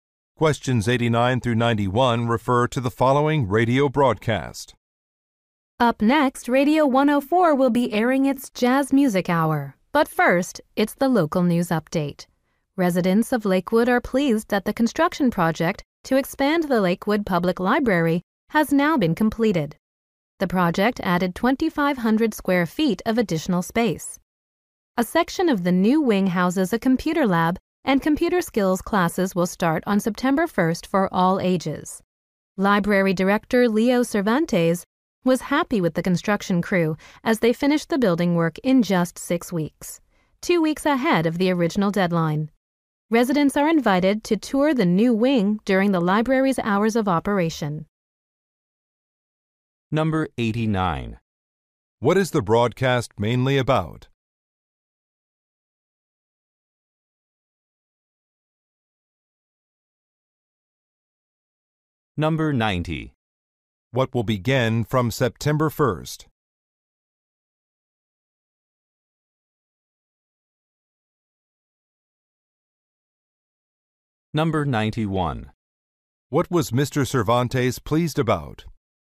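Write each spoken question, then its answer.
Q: What is the broadcast mainly about?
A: Completion of a library expansion

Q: What will begin from September 1st?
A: Computer skills classes

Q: What was Mr. Cervantes pleased about?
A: The construction finished ahead of schedule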